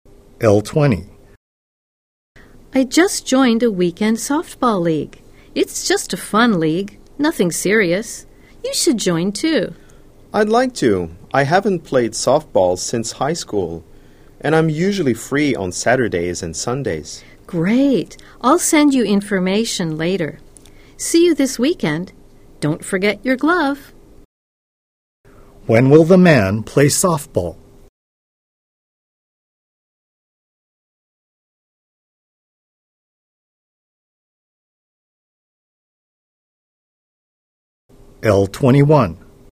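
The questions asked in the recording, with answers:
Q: When will the man play softball?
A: On weekends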